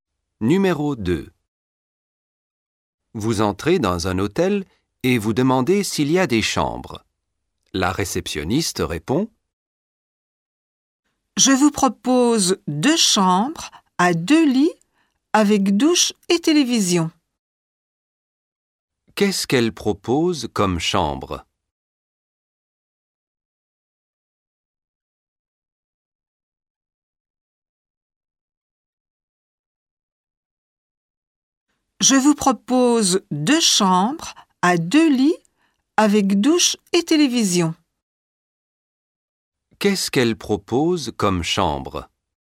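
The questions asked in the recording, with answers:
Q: Qu'est-ce qu'elle propose comme chambre?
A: Deux chambres à deux lits avec douche et télévision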